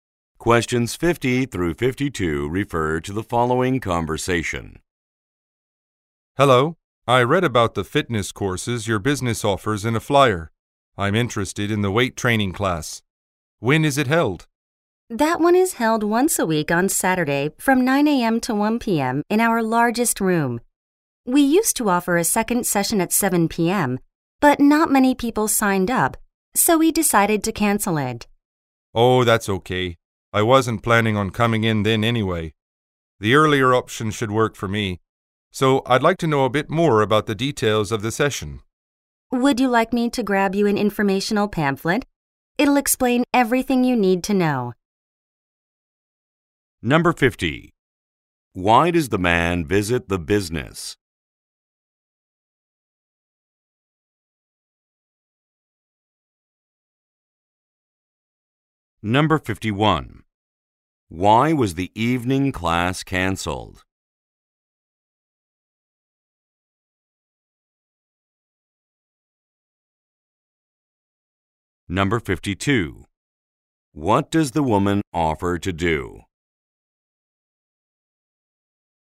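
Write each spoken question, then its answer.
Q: Why does the man visit the business?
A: To ask about the weight training class

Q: Why was the evening class canceled?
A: Not many people signed up

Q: What does the woman offer to do?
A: Get him an informational pamphlet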